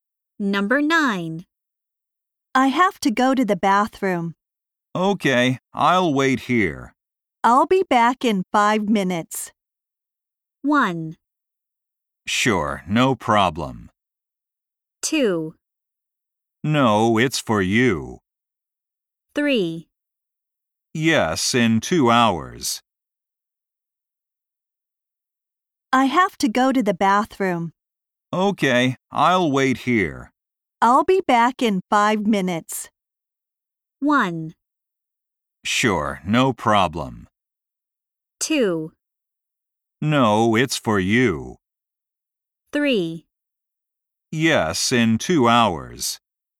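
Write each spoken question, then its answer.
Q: I'll be back in 5 minutes.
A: 1: Sure, no problem.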